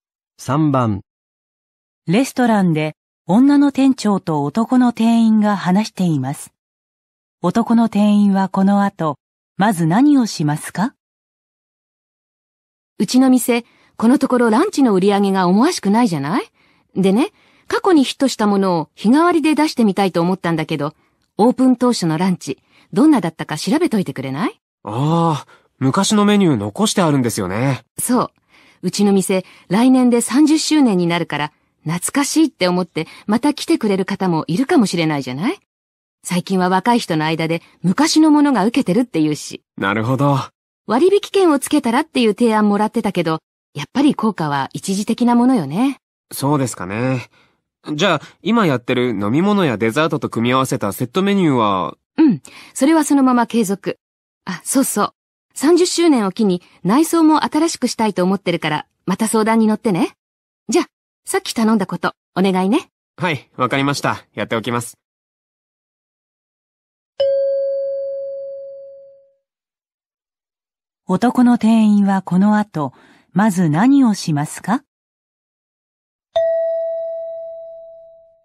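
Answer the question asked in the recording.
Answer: オープン当初のランチメニューを調べる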